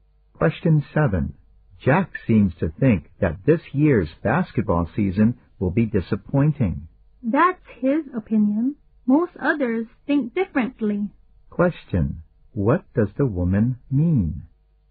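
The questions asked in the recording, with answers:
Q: What does the woman mean?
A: Most people think the season will not be disappointing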